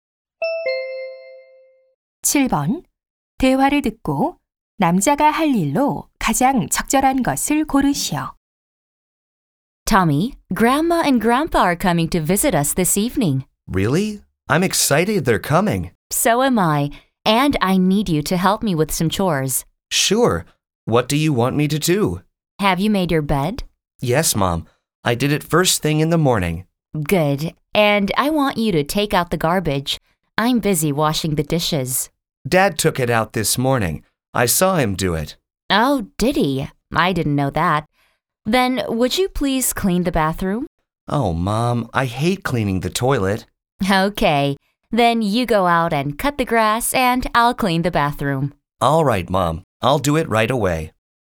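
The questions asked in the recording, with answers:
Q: 대화를 듣고 남자가 할 일로 가장 적절한 것을 고르시오.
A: 잔디 깎기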